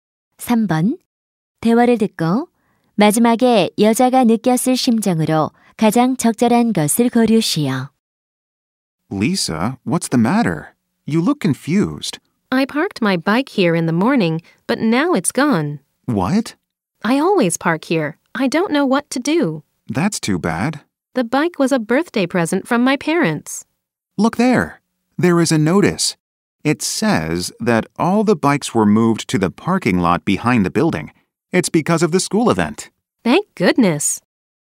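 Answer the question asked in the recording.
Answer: 안도함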